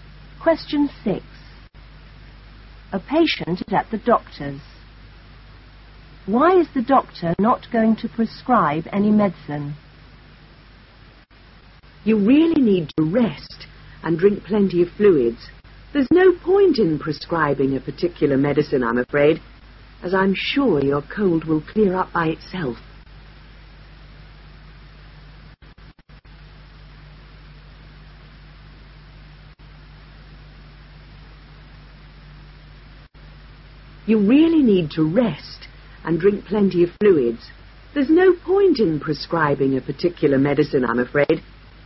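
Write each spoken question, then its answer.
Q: Why is the doctor not going to prescribe any medicine?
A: The cold will clear up by itself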